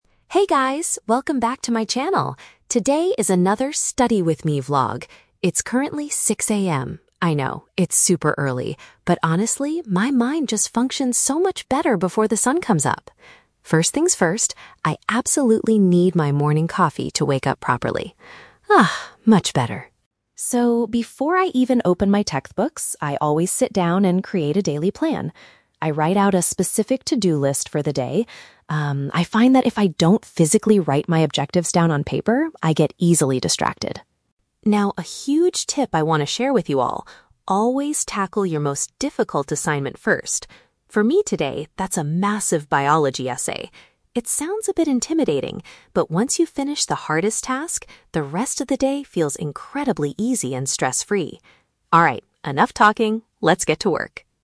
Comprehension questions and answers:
Listen to the student vlogger talking about her morning routine and choose the correct answer (A, B, or C) for each question.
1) Why does the vlogger choose to wake up at 6:00 AM to study?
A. Because she wants to go outside and watch the sunrise.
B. Because her brain works more effectively in the early hours.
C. Because she needs extra time to commute to her university.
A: Because her brain works more effectively in the early hours.

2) What does the vlogger do right before she opens her textbooks?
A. She prepares a written list of her goals for the day.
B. She goes to the kitchen to make a cup of coffee.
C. She checks her emails and social media accounts.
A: She prepares a written list of her goals for the day.

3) What is the vlogger's main advice for her viewers?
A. To practice writing a biology essay every single morning.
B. To take frequent short breaks while doing homework.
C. To complete the most challenging project at the beginning.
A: To complete the most challenging project at the beginning.

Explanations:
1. Chloe says, "my mind just functions so much better before the sun comes up." Option B perfectly paraphrases this as her brain working "more effectively in the early hours." Option A is a trap; she mentions the sun coming up, but she doesn't wake up to watch it. Option C is plausible for a student but is never mentioned in the audio.
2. Chloe states, "before I even open my textbooks, I always sit down and create a daily plan" and "write out a specific to-do list." Option A paraphrases this as preparing a "written list of her goals." Option B is a trap; she drinks coffee, but she does that "first things first," before making her plan. Option C is not mentioned.
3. Her huge tip is to "always tackle your most difficult assignment first." Option C paraphrases this exactly as completing the "most challenging project at the beginning." Option A is a trap; she mentions a biology essay, but that is just her personal task for today, not her general advice. Option B is a good study tip but is not mentioned in this vlog.

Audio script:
Chloe: Hey guys, welcome back to my channel! Today is another 'Study with me' vlog. I know, it's super early, but honestly, my mind just functions so much better before the sun comes up. First things first, I absolutely need my morning coffee to wake up properly. Ah, much better.
So, before I even open my textbooks, I always sit down and create a daily plan. I write out a specific to-do list for the day. Um, I find that if I don't physically write my objectives down on paper, I get easily distracted.
Now, a huge tip I want to share with you all: always tackle your most difficult assignment first. For me today, that's a massive biology essay. It sounds a bit intimidating, but once you finish the hardest task, the rest of the day feels incredibly easy and stress-free. Alright, enough talking, let's get to work!

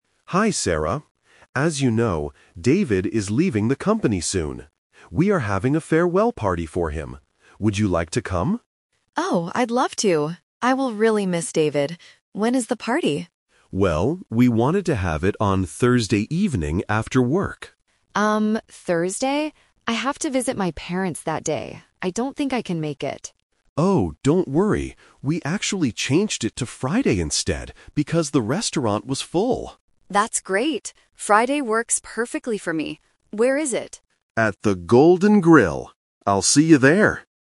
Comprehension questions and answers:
Listen to the conversation and choose the correct answer (A, B, or C).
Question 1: Why are they having a party?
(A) To welcome a new manager.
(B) To say goodbye to David.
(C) To celebrate Sarah's birthday.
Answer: To say goodbye to David.

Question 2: What day is the party going to be?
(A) Thursday.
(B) Friday.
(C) Saturday.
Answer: Friday.

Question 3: Why did Mr. Evans change the day of the party?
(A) Because the restaurant was full.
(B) Because Sarah has to visit her parents.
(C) Because David has to leave early.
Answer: Because the restaurant was full.

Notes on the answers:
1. Mr. Evans says, "David is leaving the company soon. We are having a farewell party for him." (A farewell party is a party to say goodbye). Option A and C are plausible reasons for an office party, but they are not mentioned.
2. This is the Final Result. Mr. Evans says, "We actually changed it to Friday instead." Option A is the Trap; Thursday was the original plan, but they changed it. Option C is not mentioned.
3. Mr. Evans clearly states they changed the day to Friday "because the restaurant was full." Option B is a Trap; Sarah mentions visiting her parents on Thursday, but that is not the reason the manager changed the party day.

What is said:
Evans: Hi Sarah. As you know, David is leaving the company soon. We are having a farewell party for him. Would you like to come?
Sarah: Oh, I'd love to! I will really miss David. When is the party?
Mr. Evans: Well, we wanted to have it on Thursday evening after work.
I have to visit my parents that day. I don't think I can make it.
Evans: Oh, don't worry! We actually changed it to Friday instead because the restaurant was full.
Sarah: That's great! Friday works perfectly for me. Where is it?

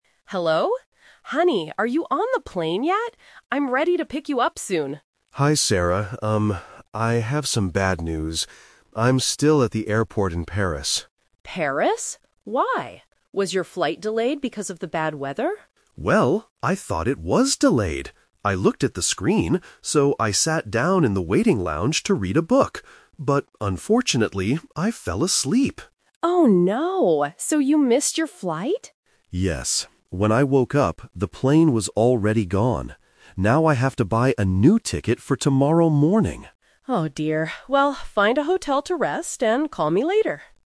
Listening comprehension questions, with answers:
Listen to a telephone conversation between a husband and wife. Choose the correct answer (A, B, or C) for each question.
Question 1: Where is the husband right now?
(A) On the plane.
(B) At a hotel.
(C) At the airport in Paris.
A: At the airport in Paris.

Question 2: Why did the husband miss his flight?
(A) Because there was bad weather.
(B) Because he fell asleep.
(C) Because he arrived at the airport late.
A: Because he fell asleep.

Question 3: When will the husband fly back home?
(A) Later today.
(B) Tomorrow morning.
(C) Tomorrow night.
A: Tomorrow morning.

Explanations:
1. The husband clearly states, "I'm still at the airport in Paris." Option A is the trap: his wife asks "are you on the plane yet?" because that was her expectation, but he isn't. Option B is a trap: his wife tells him to "find a hotel" at the end of the call, but he is not there yet.
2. The husband explains what happened: "...But unfortunately, I fell asleep!". Option A is the trap: the wife asks if it was "because of the bad weather," and he "thought it was delayed," but the real reason he missed the plane was falling asleep. Option C is a plausible reason for missing a flight but is never mentioned.
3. The husband says, "Now I have to buy a new ticket for tomorrow morning." Options A and C are plausible times to book a new flight but are not mentioned in the audio.

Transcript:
Wife: Hello? Honey, are you on the plane yet? I'm ready to pick you up soon.
Husband: Hi, Sarah. I have some bad news. I'm still at the airport in Paris.
Wife: Paris? Why? Was your flight delayed because of the bad weather?
Husband: Well, I thought it was delayed! I looked at the screen, so I sat down in the waiting lounge to read a book. But unfortunately, I fell asleep!
Wife: Oh no! So you missed your flight?
Husband: Yes. When I woke up, the plane was already gone. Now I have to buy a new ticket for tomorrow morning.

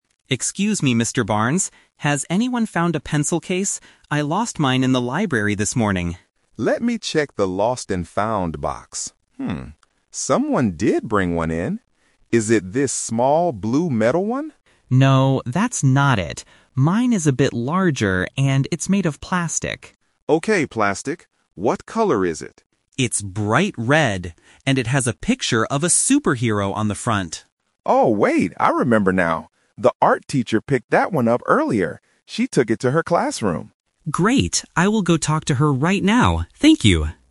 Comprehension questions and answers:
Listen to the conversation and choose the correct answer (A, B, or C).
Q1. What is Leo's pencil case made of?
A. Metal.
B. Plastic.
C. Fabric.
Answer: Plastic.

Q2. What does Leo's pencil case look like?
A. It is small and blue.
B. It is bright red with a picture.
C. It is large and black.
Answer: It is bright red with a picture.

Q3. Where is Leo's pencil case right now?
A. In the library.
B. In the lost and found box.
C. In the art classroom.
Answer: In the art classroom.

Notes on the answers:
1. Leo corrects the security guard and says his pencil case is "made of plastic." The Trap: Option (A) is a trap because Mr. Barnes asks if it is the "metal one," but Leo says no. Option (C) is a common material for pencil cases but is not mentioned.
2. Leo clearly describes it: "It's bright red. And it has a picture of a superhero on the front." The Trap: Option (A) is a trap because it describes the pencil case that the security guard is holding, not Leo's.
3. Mr. Barnes says the art teacher picked it up and "took it to her classroom." The Trap: Option (A) is a trap because the library is where Leo lost it, not where it is now. Option (B) is a trap because the guard checks the "lost and found box," but Leo's pencil case is not inside it.

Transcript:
Leo: Excuse me, Mr. Barnes. Has anyone found a pencil case? I lost mine in the library this morning.
Mr. Barnes: Let me check the lost and found box. someone did bring one in. Is it this small, blue metal one?
Leo: No, that's not it. Mine is a bit larger, and it's made of plastic.
Mr. Barnes: Okay, plastic. What color is it?
Leo: It's bright red. And it has a picture of a superhero on the front.
Mr. Barnes: Oh, wait! I remember now. The art teacher picked that one up earlier.

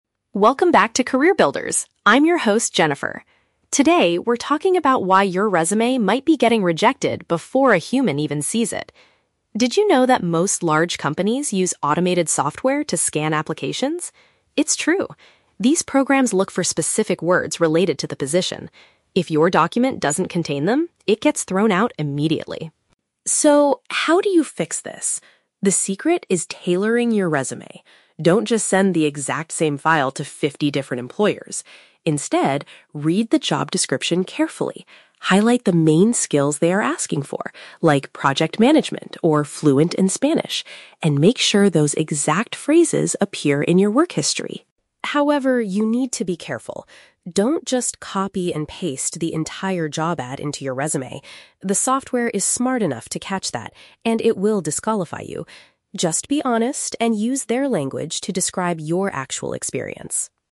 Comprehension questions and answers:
Listen to a podcast episode about job hunting and choose the correct answer (A, B, or C) for each question.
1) Why are many applications rejected at the very beginning?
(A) They are read by busy HR managers who do not have enough time.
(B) They lack the required vocabulary that the computer programs search for.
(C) They contain too many spelling and grammatical errors.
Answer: They lack the required vocabulary that the computer programs search for.

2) What is Jennifer's main advice for job seekers?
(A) Adjust your document to match the specific requirements of each role.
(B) Submit your standard application to as many companies as possible.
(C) Hire a professional writer to format your work history beautifully.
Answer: Adjust your document to match the specific requirements of each role.

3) What does the host warn applicants NOT to do?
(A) Lie about having foreign language skills like Spanish.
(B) Forget to include their contact information on the file.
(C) Directly duplicate the whole job advertisement into their resumes.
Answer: Directly duplicate the whole job advertisement into their resumes.

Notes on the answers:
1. Jennifer explains that companies use "automated software" that looks for "specific words". If your document doesn't contain them, it gets thrown out. Option (B) paraphrases this idea. Option (A) is The Trap: The audio explicitly says the resume is rejected "before a human even sees it", so HR managers are not reading them at this stage. Option (C) is plausible in real life but is never mentioned in the podcast.
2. Jennifer tells listeners to "tailor" their resumes by reading the job description carefully and highlighting the main skills they are asking for. Option (A) uses synonyms for this action (tailor = adjust; job description = requirements of each role). Option (B) is The Trap: She explicitly says "Don't just send the exact same file to fifty different employers", which is the exact opposite of Option (B). Option (C) is not mentioned.
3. Jennifer warns: "Don't just copy and paste the entire job ad into your resume." Option (C) is a perfect paraphrase (copy and paste = directly duplicate; entire job ad = whole job advertisement). Option (A) is The Trap: She mentions "fluent in Spanish" as an example of a skill you might highlight, not as a warning about lying. Option (B) is not mentioned.

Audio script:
Jennifer: Welcome back to 'Career Builders'. I'm your host, Jennifer. Today, we're talking about why your resume might be getting rejected before a human even sees it. Did you know that most large companies use automated software to scan applications? It's true. These programs look for specific words related to the position. If your document doesn't contain them, it gets thrown out immediately.
So, how do you fix this? The secret is tailoring your resume. Don't just send the exact same file to fifty different employers. Instead, read the job description carefully. Highlight the main skills they are asking for—like 'project management' or 'fluent in Spanish'—and make sure those exact phrases appear in your work history.
However, you need to be careful. Don't just copy and paste the entire job ad into your resume. The software is smart enough to catch that, and it will disqualify you. Just be honest and use their language to describe your actual experience.

